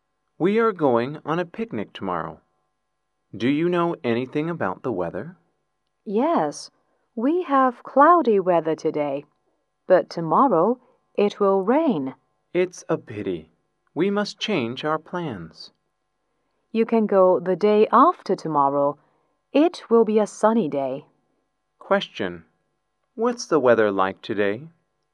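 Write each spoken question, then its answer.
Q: Question. What's the weather like today?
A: Cloudy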